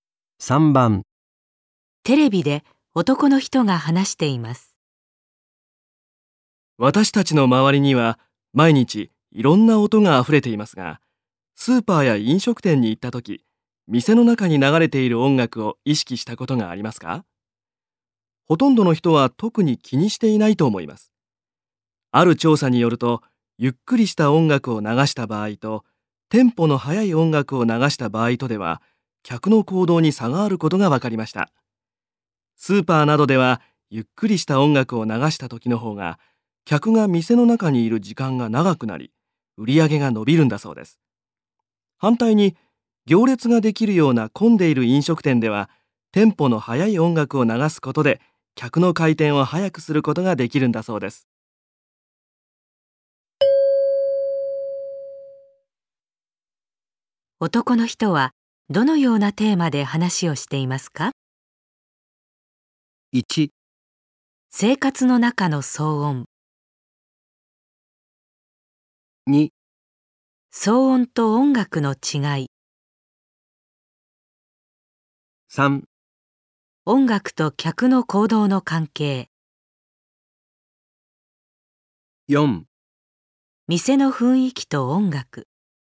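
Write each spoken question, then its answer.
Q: 男の人はどのようなテーマで話をしていますか?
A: 3: 音楽と客の行動の関係。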